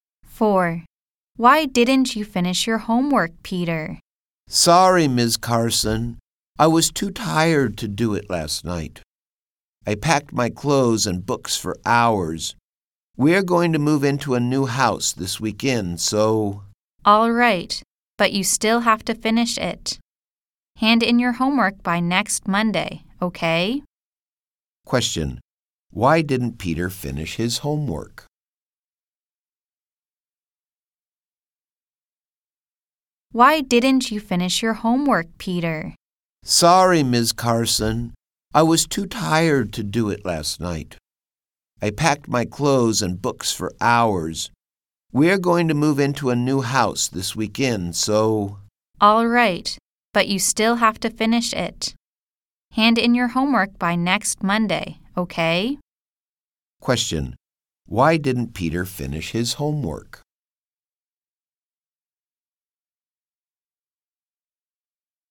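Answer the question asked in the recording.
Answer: He was too tired after packing for hours for moving house.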